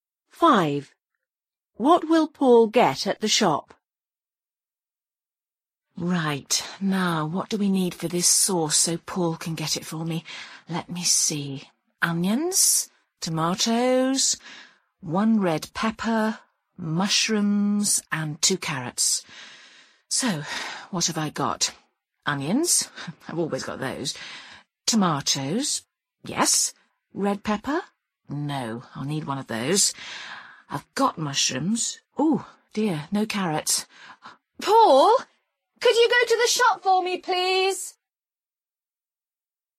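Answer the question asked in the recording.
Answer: A red pepper and carrots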